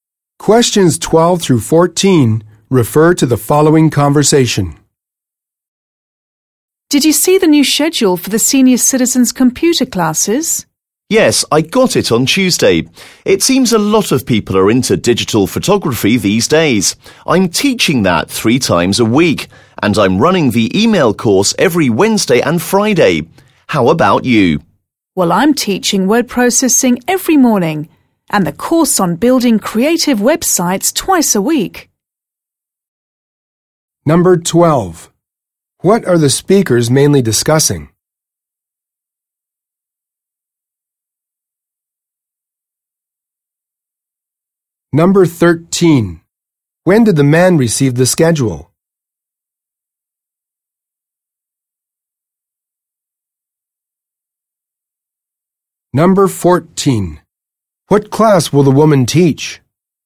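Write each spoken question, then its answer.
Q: What are the speakers mainly discussing?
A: The schedule for the senior citizens' computer classes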